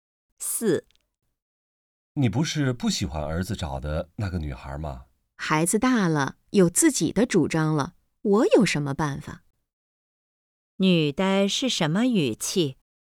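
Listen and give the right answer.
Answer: 无奈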